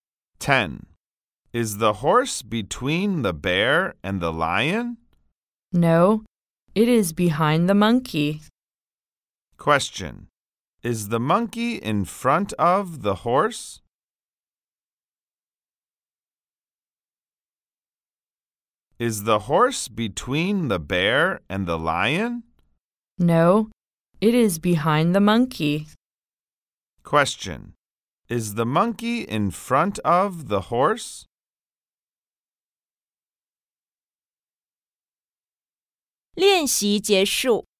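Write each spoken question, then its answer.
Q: Is the monkey in front of the horse?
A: Yes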